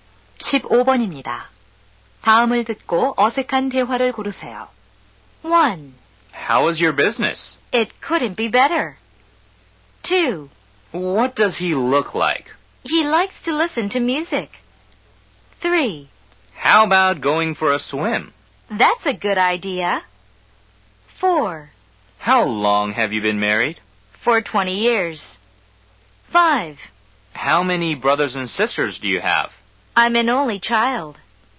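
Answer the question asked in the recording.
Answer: 2: What does he look like? / He likes to listen to music.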